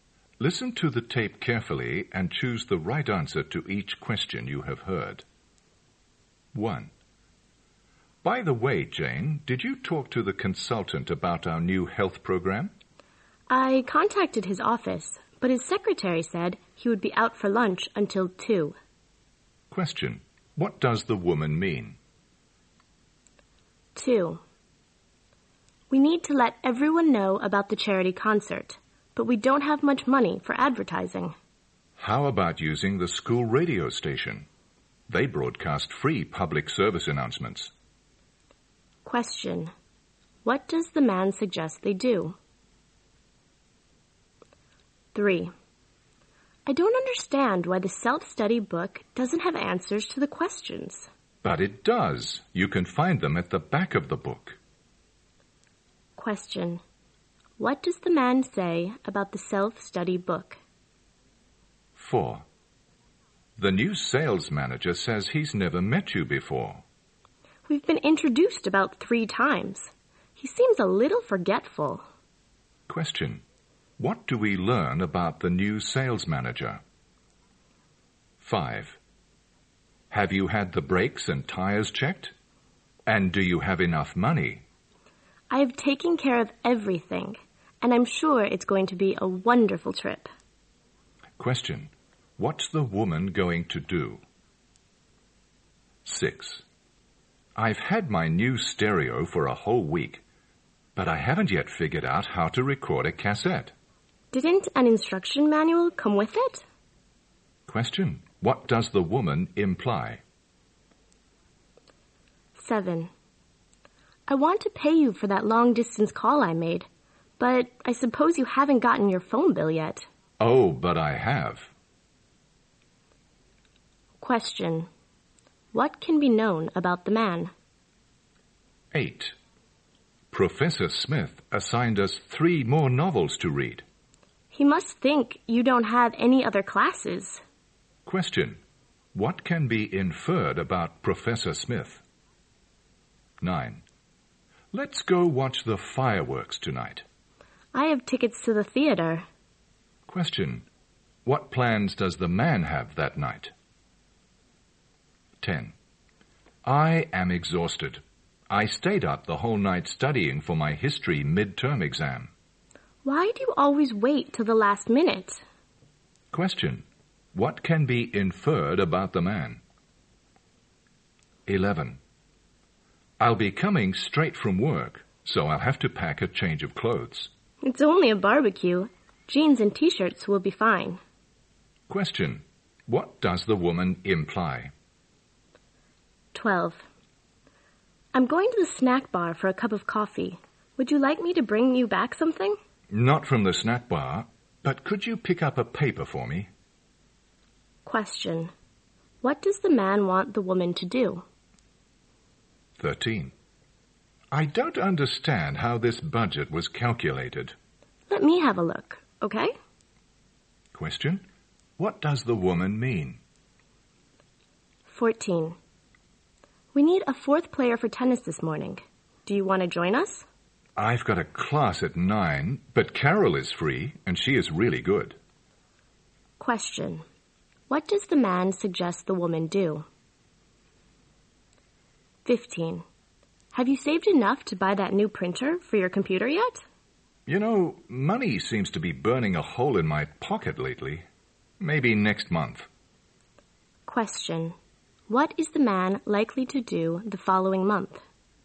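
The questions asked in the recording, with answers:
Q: What plans does the man have that night?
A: To go to the theater

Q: What does the man want the woman to do?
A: Pick up a newspaper for him

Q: What does the man suggest the woman do?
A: Ask Carol to play tennis

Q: What is the man likely to do the following month?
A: Buy the new printer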